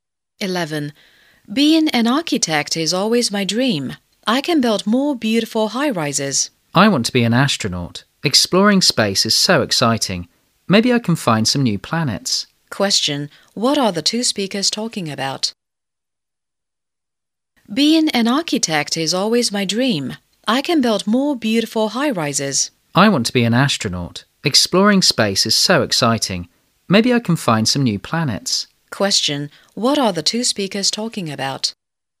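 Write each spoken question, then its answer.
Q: Question. What are the two speakers talking about?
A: Their dream jobs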